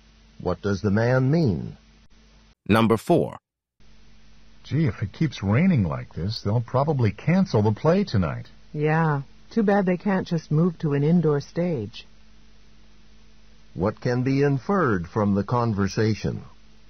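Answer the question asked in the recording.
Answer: The play is going to be performed outdoors.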